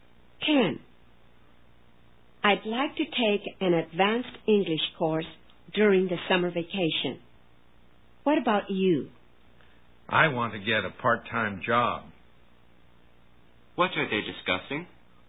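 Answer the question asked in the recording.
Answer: Their plans for the summer vacation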